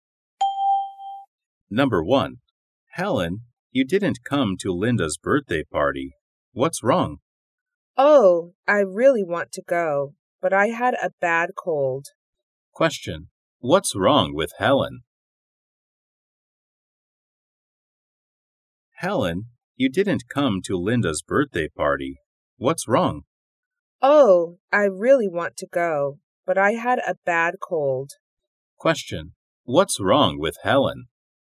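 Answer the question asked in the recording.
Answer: She had a bad cold.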